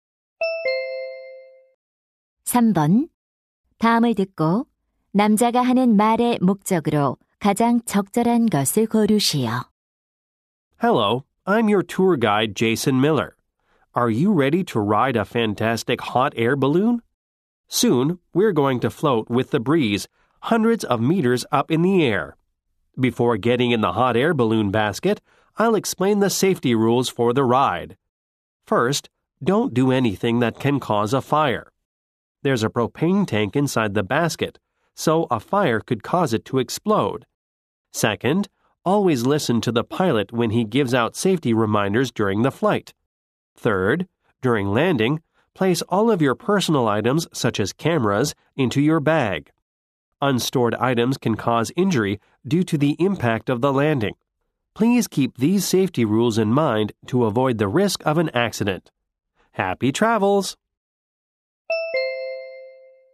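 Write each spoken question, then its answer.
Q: 다음을 듣고 남자가 하는 말의 목적으로 가장 적절한 것을 고르시오.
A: 열기구 탑승 안전 수칙을 안내하려고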